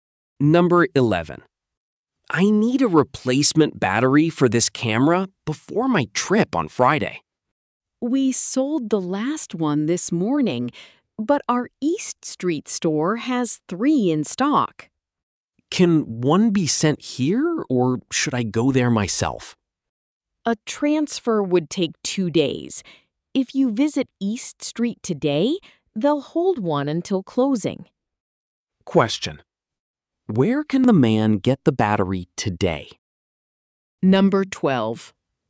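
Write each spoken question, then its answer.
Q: where can the man get the battery today?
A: At the East Street store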